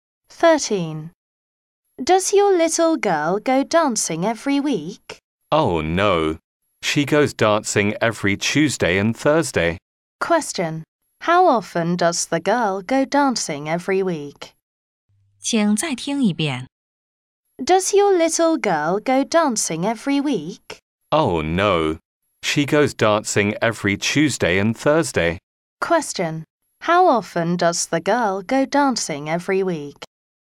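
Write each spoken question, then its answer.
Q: How often does the girl go dancing every week?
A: Twice a week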